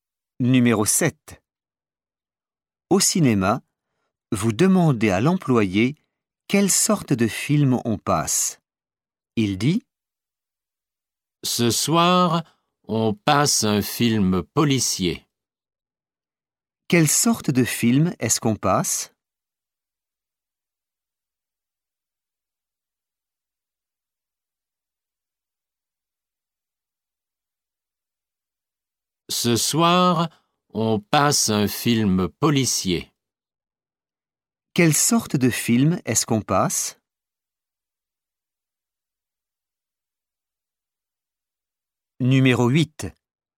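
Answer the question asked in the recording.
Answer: un film policier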